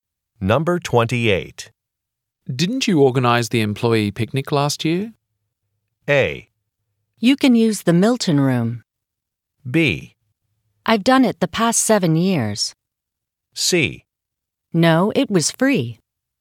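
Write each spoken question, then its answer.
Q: Didn't you organize the employee picnic last year?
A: B: I've done it the past 7 years.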